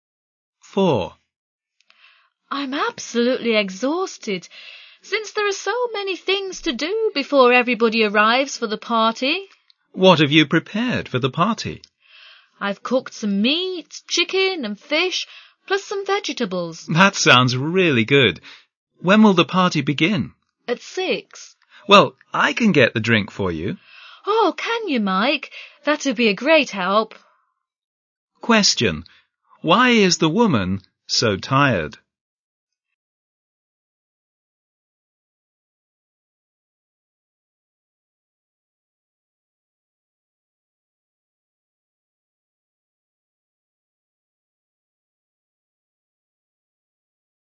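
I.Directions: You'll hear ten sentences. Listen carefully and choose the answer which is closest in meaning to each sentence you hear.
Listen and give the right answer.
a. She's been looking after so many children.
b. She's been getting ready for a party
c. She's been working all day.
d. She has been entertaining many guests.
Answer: b. She's been getting ready for a party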